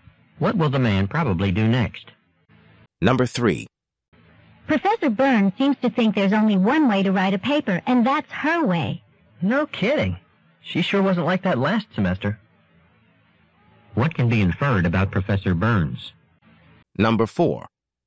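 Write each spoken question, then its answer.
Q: What can be inferred about Professor Burns?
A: She has become stricter and more inflexible about papers than she was last semester.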